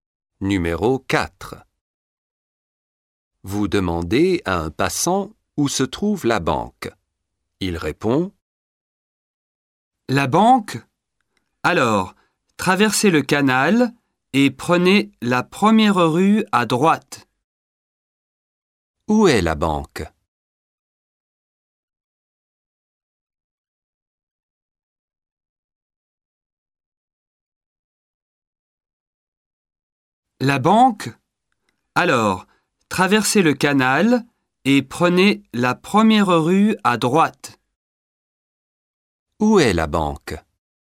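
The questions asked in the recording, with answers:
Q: Où est la banque?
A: Après le canal, première rue à droite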